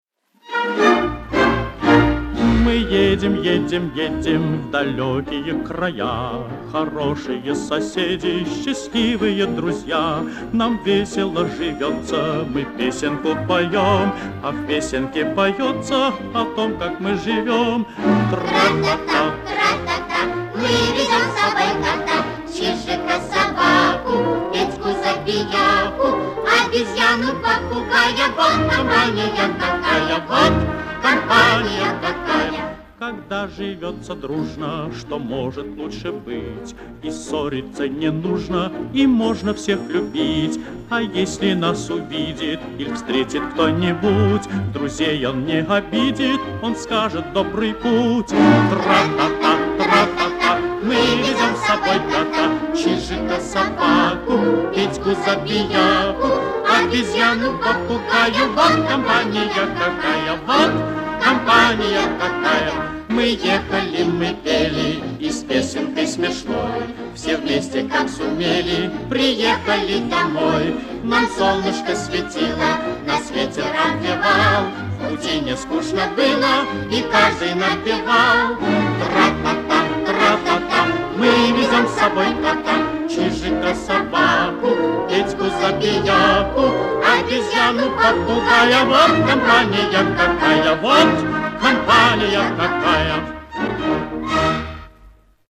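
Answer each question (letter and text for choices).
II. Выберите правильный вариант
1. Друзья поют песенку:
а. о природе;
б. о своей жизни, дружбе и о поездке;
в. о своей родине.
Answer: б. о своей жизни, дружбе и о поездке;

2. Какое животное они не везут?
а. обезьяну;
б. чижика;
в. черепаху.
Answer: в. черепаху.

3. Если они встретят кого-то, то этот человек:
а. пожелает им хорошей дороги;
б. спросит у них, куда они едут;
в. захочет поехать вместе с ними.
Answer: а. пожелает им хорошей дороги;

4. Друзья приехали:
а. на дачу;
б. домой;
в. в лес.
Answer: б. домой;

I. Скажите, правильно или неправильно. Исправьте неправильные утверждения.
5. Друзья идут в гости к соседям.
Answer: Неправильно: они едут в далёкие края.

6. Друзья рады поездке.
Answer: Правильно

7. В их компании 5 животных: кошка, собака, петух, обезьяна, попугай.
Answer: Неправильно: 6 животных, ещё чижик.

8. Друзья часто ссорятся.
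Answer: Неправильно: ссориться не нужно, они живут дружно.

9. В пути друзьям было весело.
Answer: Правильно

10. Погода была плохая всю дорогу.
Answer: Неправильно: им светило солнышко.

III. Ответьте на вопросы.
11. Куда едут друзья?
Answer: В далёкие края.

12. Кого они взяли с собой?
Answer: Кота, чижика, собаку, петуха Петьку, обезьяну, попугая.

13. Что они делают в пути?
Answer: Поют песенку.

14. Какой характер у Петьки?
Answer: Он забияка.

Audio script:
Тра-та-та, тра-та-та, мы везём с собой кота,
Чижика, собаку, Петьку - забияку,
Обезьяну, попугая, вот компания какая!
Вот - компания какая!
2. Когда живётся дружно, что может лучше быть?
И ссориться не нужно, и можно всех любить!
А если нас увидит иль встретит кто-нибудь,
Друзей он не обидит, он скажет: "В добрый путь!"
3. Мы ехали, мы пели, и с песенкой смешной
Все вместе, как сумели, приехали домой!
Нам солнышко светило, нас ветер обвевал,
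В пути не скучно было, и каждый напевал.

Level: А2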